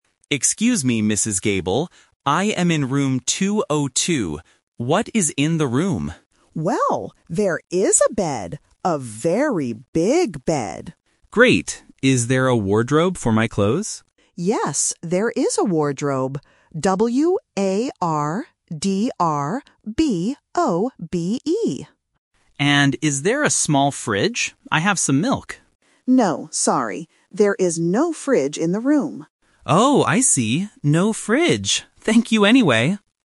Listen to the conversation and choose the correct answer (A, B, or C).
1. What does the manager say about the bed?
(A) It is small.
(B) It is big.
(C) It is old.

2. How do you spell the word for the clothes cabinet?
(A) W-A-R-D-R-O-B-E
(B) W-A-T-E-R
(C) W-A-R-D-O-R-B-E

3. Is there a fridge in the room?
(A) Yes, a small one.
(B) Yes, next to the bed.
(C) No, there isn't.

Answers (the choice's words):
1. It is big.
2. W-A-R-D-R-O-B-E
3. No, there isn't.

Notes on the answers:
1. Mrs. Gable says, "There is a bed. A very big bed." Option (A) is the opposite of what she said. Option (C) is plausible but not mentioned.
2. The manager spells the word clearly in the script. Option (B) is a completely different word. Option (C) is a spelling trap with the letters swapped.
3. When Tom asks for a fridge, the manager says, "No, sorry. There is no fridge in the room." Option (A) is a trap because Tom asks for a "small" one, but it doesn't exist. Option (B) is a distractor using a location word from earlier.

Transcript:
Tom: Excuse me, Mrs. Gable. I am in room 202. What is in the room?
Mrs. Gable: Well, there is a bed. A very big bed.
Tom: Great. Is there a wardrobe for my clothes?
Tom: And is there a small fridge? I have some milk.
Mrs. Gable: No, sorry. There is no fridge in the room.
Tom: Oh, I see. No fridge. Thank you anyway!

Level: A1